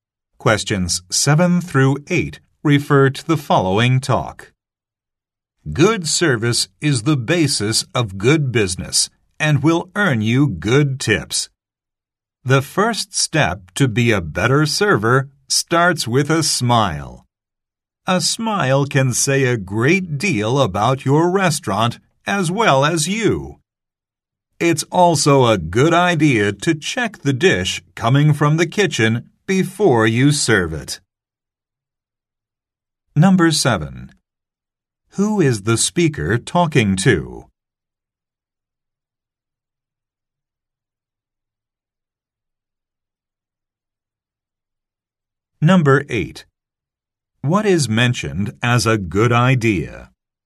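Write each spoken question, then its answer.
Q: Who is the speaker talking to?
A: Restaurant servers

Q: What is mentioned as a good idea?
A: Checking the dish from the kitchen before serving it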